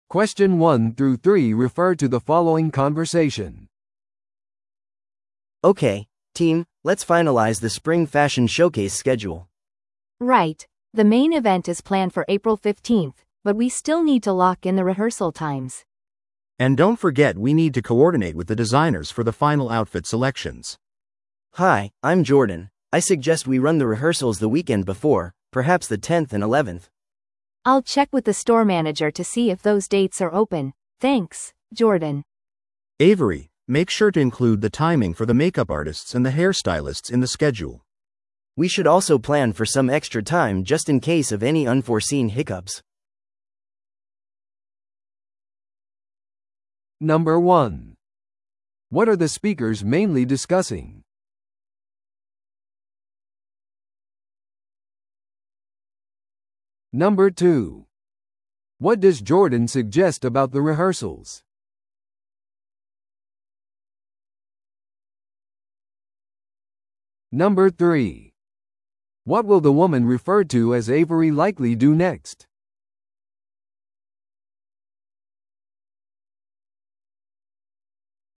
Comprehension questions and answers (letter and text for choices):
Listen to the audio below and answer the questions.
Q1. What are the speakers mainly discussing?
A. デザイナーの衣装の調整。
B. 今後の店舗イベントのスケジュール。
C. 元従業員の再雇用。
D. 新しいマーケティングキャンペーンの予算。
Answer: B. 今後の店舗イベントのスケジュール。

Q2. What does Jordan suggest about the rehearsals?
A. 4月10日と11日に行うこと。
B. 平日中に行うこと。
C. 5月までそれらを延期すること。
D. デザイナーが利用できない場合はそれらをキャンセルすること。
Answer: A. 4月10日と11日に行うこと。

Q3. What will the woman referred to as Avery likely do next?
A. メイクアップチームとヘアチームに相談する。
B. 日付について店長と話をする。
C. ショーケースを遅い時間にスケジュール変更する。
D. 予期せぬ問題のリストを準備する。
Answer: B. 日付について店長と話をする。

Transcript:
A: Okay, team, let's finalize the spring fashion showcase schedule.
B: Right. The main event is planned for April 15th, but we still need to lock in the rehearsal times.
C: And don't forget we need to coordinate with the designers for the final outfit selections.
A: Hi, I'm Jordan. I suggest we run the rehearsals the weekend before, perhaps the 10th and 11th.
B: I'll check with the store manager to see if those dates are open. Thanks, Jordan.
C: Avery, make sure to include the timing for the makeup artists and the hair stylists in the schedule.
A: We should also plan for some extra time just in case of any unforeseen hiccups.